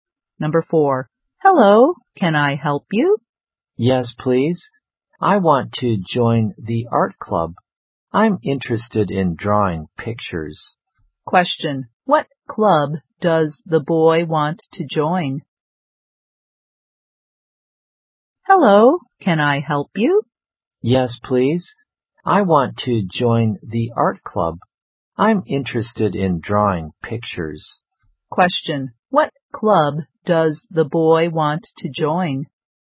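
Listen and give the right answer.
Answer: The art club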